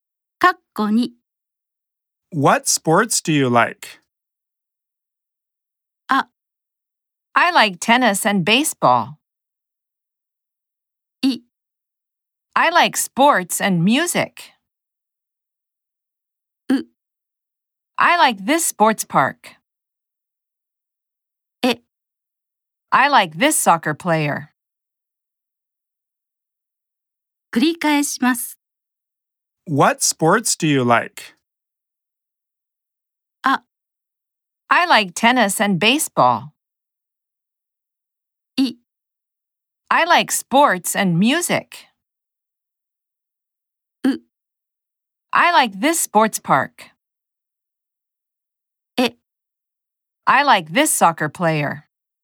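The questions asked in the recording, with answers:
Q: What sports do you like?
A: あ: I like tennis and baseball.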